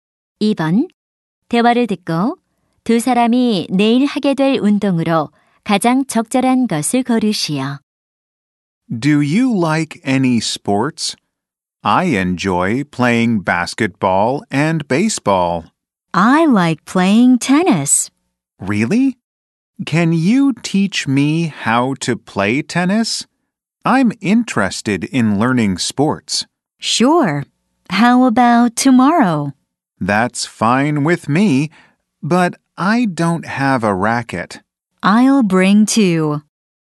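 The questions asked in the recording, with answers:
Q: 대화를 듣고 두 사람이 내일 하게 될 운동으로 가장 적절한 것을 고르시오.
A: 테니스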